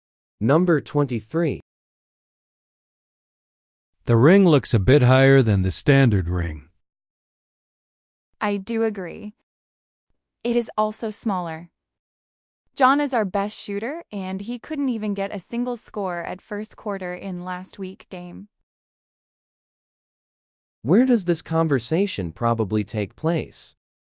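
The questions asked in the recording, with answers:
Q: Where does this conversation probably take place?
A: On a basketball court.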